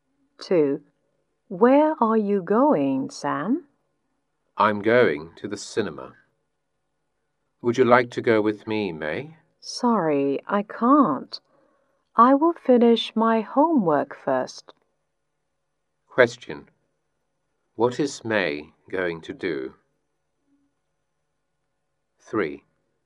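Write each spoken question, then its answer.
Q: What is May going to do?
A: Finish her homework.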